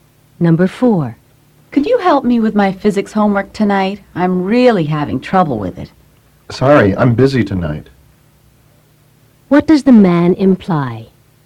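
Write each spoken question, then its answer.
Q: What does the man imply?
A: He can't help with the homework tonight.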